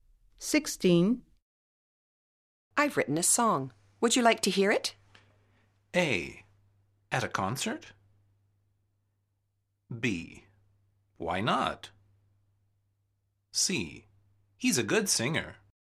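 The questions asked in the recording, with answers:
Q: I've written a song. Would you like to hear it?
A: B: Why not?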